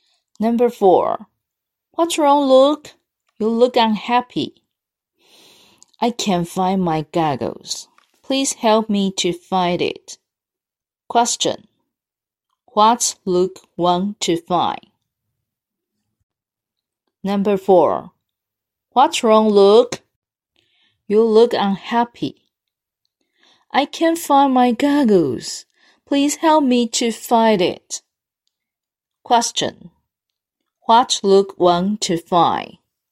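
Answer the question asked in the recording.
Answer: His goggles.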